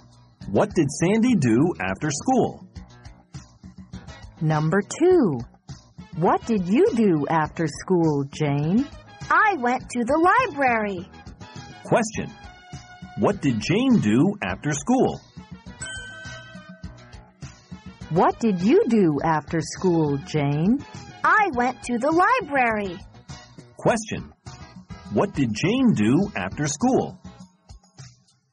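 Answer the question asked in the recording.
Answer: She went to the library.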